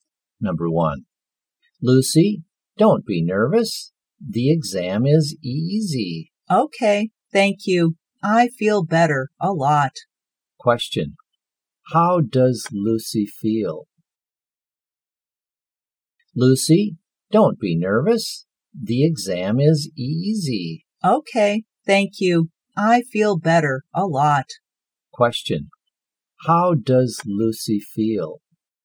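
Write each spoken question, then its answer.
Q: How does Lucy feel?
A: Better; less nervous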